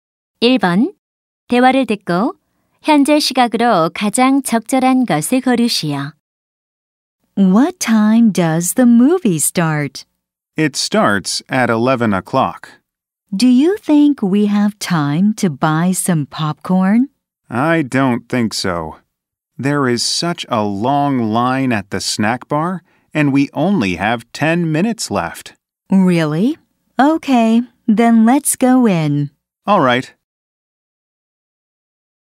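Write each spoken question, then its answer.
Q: 대화를 듣고 현재 시각으로 가장 적절한 것을 고르시오.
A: 10시 50분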